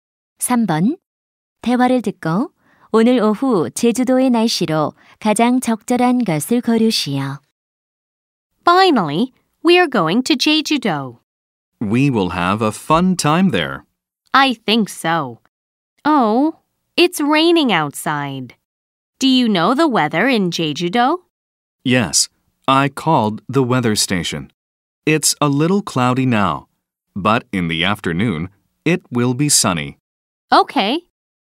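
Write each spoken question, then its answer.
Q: 대화를 듣고 오늘 오후 제주도의 날씨로 가장 적절한 것을 고르시오.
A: 맑음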